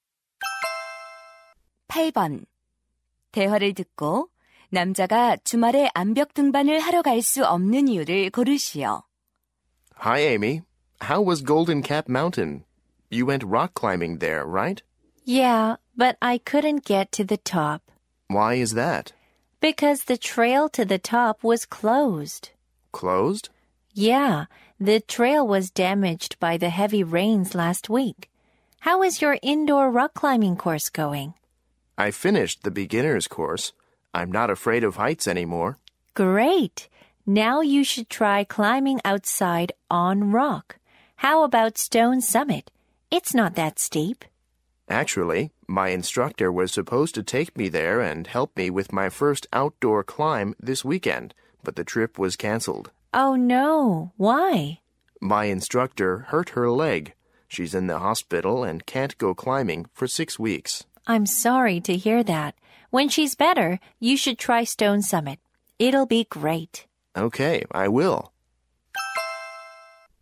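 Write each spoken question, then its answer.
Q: 대화를 듣고 남자가 주말에 암벽 등반을 하러 갈 수 없는 이유를 고르시오.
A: 강사가 다리를 다쳐서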